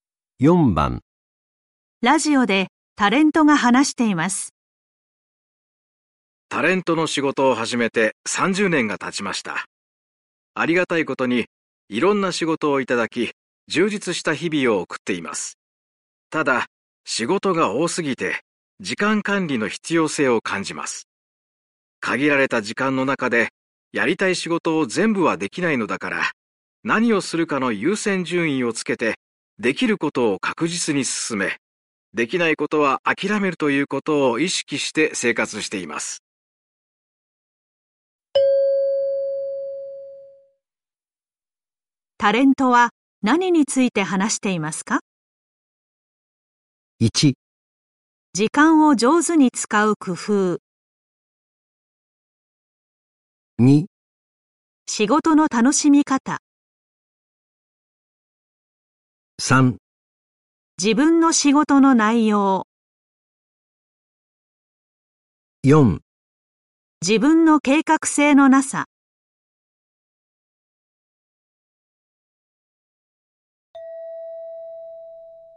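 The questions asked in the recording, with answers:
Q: タレントは何について話していますか?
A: 1: 時間を上手に使う工夫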